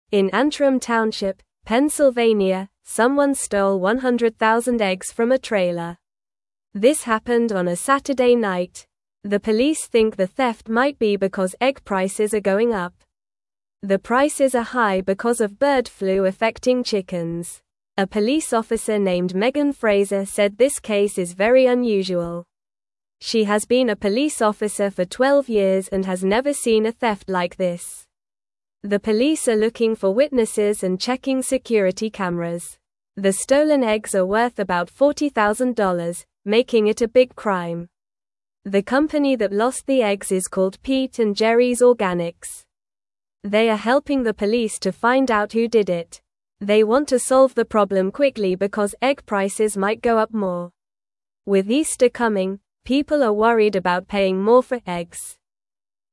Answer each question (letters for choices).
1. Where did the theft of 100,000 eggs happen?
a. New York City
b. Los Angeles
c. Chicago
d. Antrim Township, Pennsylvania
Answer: d

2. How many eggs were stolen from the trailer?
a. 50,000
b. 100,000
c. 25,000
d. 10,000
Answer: b

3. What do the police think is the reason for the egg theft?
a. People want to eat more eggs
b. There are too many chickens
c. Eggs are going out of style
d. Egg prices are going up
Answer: d

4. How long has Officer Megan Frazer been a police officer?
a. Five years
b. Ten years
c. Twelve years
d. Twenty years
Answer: c

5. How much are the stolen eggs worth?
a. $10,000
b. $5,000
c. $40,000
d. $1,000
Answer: c

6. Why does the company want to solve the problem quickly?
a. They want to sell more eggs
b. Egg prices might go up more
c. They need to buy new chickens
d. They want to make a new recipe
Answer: b

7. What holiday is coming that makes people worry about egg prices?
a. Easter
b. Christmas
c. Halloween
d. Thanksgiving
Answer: a

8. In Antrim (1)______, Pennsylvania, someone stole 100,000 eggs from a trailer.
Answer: Township

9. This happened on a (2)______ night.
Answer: Saturday

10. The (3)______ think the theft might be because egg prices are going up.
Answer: police

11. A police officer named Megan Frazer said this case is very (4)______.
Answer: unusual

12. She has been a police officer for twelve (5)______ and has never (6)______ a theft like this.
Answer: years

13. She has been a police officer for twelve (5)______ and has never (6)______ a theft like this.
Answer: seen

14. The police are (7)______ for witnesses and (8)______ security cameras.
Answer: looking

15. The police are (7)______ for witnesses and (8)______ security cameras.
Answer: checking

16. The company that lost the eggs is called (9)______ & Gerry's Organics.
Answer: Pete

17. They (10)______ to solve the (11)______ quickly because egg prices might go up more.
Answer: want

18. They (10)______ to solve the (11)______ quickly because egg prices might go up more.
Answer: problem

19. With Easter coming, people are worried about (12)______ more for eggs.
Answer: paying

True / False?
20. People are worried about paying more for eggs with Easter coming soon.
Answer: True

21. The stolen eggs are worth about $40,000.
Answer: True

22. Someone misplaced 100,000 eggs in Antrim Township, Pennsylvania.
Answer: False

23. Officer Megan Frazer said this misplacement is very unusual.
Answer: False

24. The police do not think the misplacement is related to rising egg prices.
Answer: False

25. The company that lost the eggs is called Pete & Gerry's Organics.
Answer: True

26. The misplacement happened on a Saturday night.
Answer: False

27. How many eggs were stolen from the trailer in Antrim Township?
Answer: 100,000 eggs were stolen.

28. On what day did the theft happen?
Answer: The theft happened on a Saturday night.

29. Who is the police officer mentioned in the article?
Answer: The police officer mentioned is Megan Frazer.

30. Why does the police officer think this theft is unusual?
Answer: She thinks it is unusual because she has never seen a theft like this in twelve years of being a police officer.

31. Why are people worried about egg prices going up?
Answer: People are worried because egg prices might go up more, especially with Easter coming.

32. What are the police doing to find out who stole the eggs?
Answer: The police are looking for witnesses and checking security cameras.

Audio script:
In Antrim Township, Pennsylvania, someone stole 100,000 eggs from a trailer. This happened on a Saturday night. The police think the theft might be because egg prices are going up. The prices are high because of bird flu affecting chickens.
A police officer named Megan Frazer said this case is very unusual. She has been a police officer for twelve years and has never seen a theft like this. The police are looking for witnesses and checking security cameras. The stolen eggs are worth about $40,000, making it a big crime.
They are helping the police to find out who did it. They want to solve the problem quickly because egg prices might go up more. With Easter coming, people are worried about paying more for eggs.

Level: Level 2